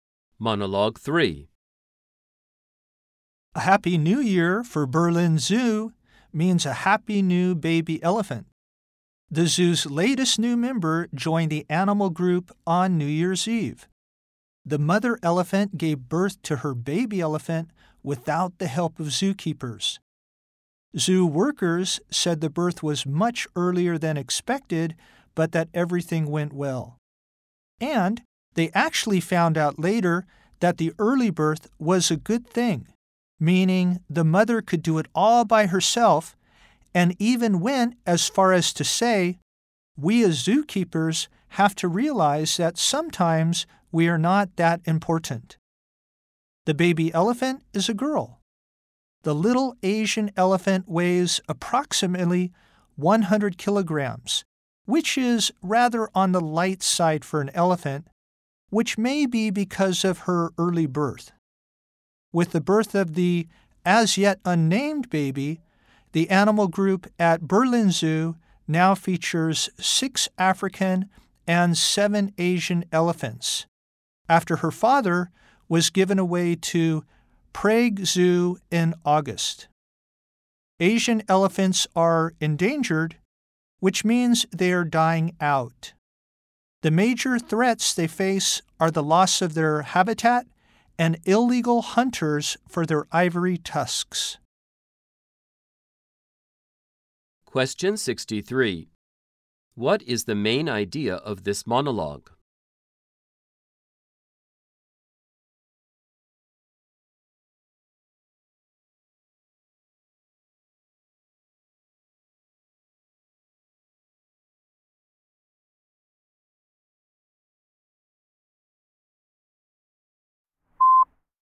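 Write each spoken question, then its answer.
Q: What is the main idea of this monologue?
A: A baby elephant was born at Berlin Zoo on New Year's Eve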